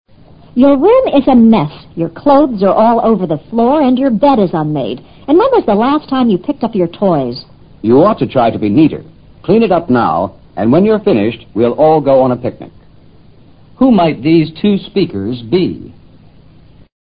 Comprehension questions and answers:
Who might these two speakers be?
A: Parents.